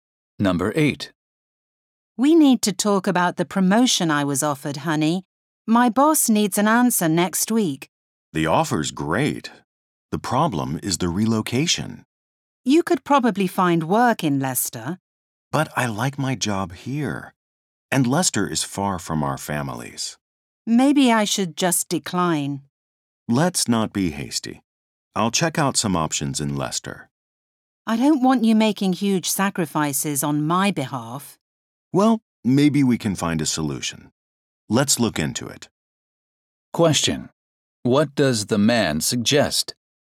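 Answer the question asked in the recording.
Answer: Not deciding too quickly, and looking into options in Leicester first.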